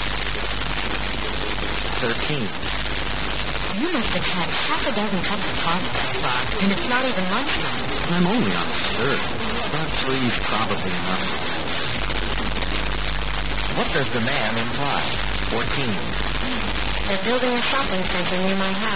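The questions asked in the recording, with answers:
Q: What does the man imply?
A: He has had only three cups, which is enough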